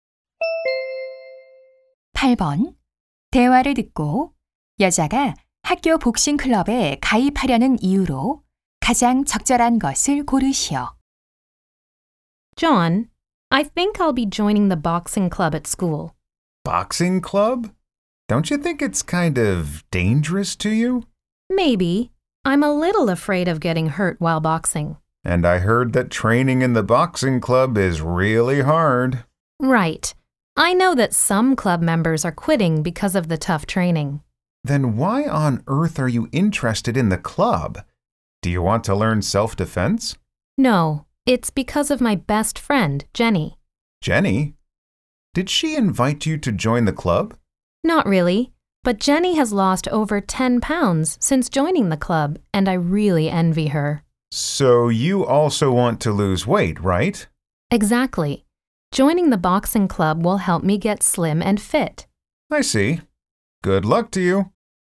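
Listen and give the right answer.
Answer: 살을 빼고 건강해지려고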